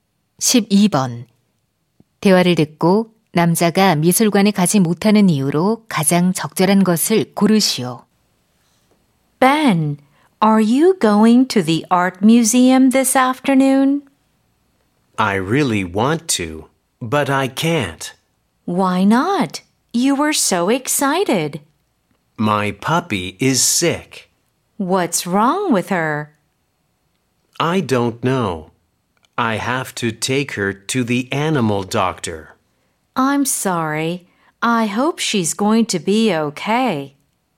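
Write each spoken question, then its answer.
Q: 대화를 듣고 남자가 미술관에 가지 못하는 이유로 가장 적절한 것을 고르시오.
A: 강아지가 아파서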